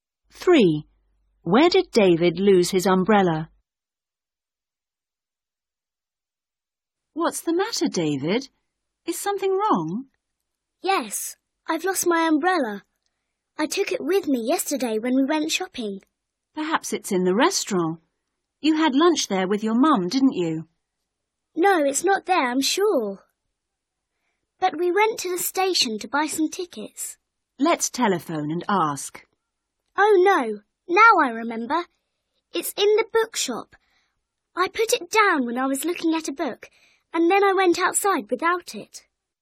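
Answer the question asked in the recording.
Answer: in the bookshop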